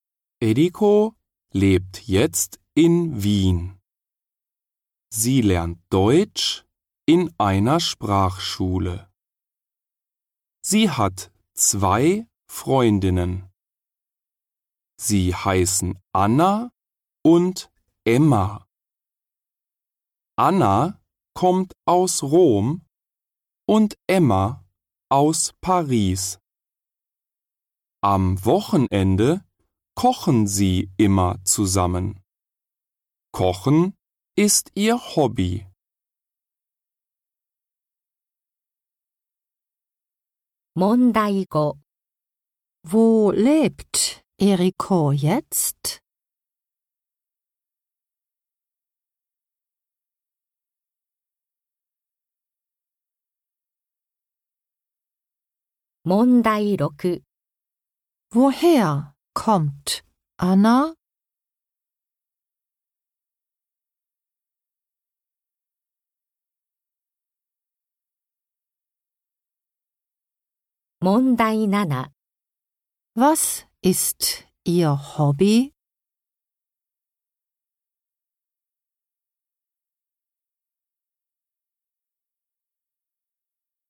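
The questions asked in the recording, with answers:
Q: Wo lebt Eriko jetzt?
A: In Wien

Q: Woher kommt Anna?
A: Aus Rom

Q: Was ist Ihr Hobby?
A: Kochen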